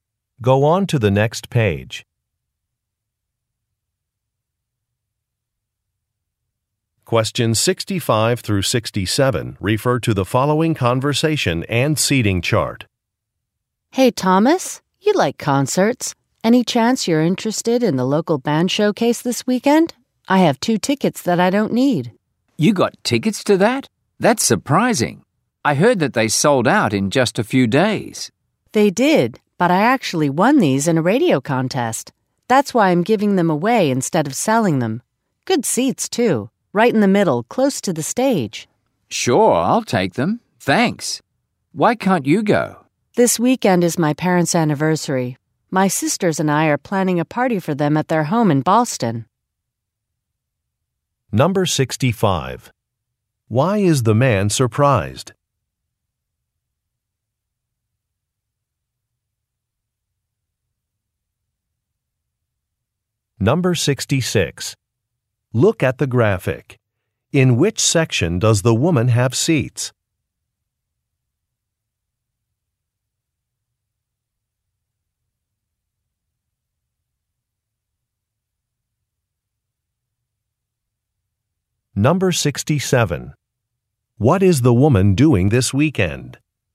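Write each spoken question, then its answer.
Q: Why is the man surprised?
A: The tickets sold out quickly

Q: What is the woman doing this weekend?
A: Attending her parents' anniversary party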